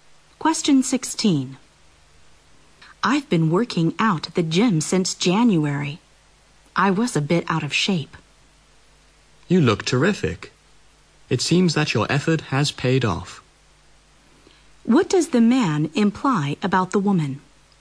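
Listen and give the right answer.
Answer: She is in good shape now thanks to her workouts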